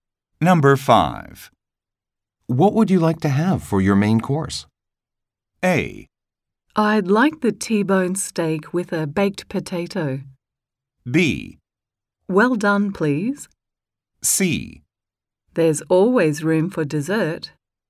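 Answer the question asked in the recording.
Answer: A: I'd like the T-bone steak with a baked potato.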